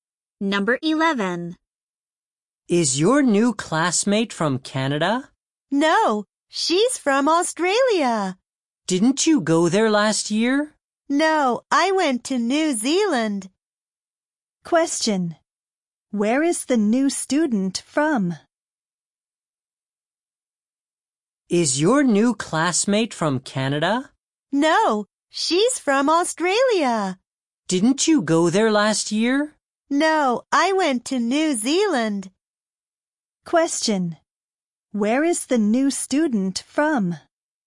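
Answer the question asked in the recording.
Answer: Australia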